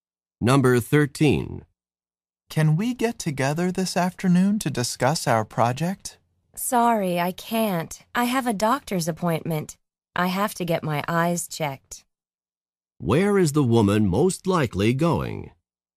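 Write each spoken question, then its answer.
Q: Where is the woman most likely going?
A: To an eye doctor's office.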